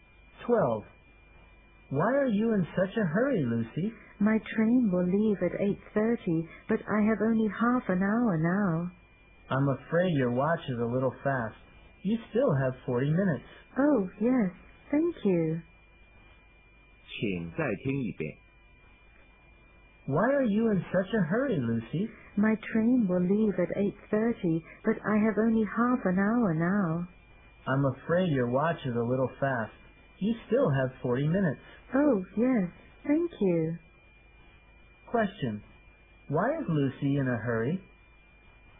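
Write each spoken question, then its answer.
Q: Question. Why is Lucy in a hurry?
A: She thinks she will miss her 8:30 train because her watch is fast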